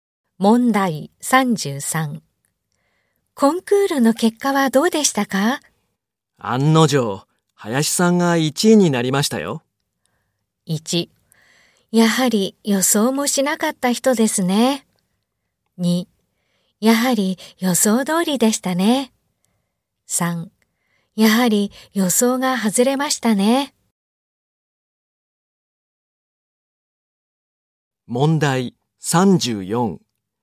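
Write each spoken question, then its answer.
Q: コンクールの結果はどうでしたか?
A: 2: やはり予想通りでしたね。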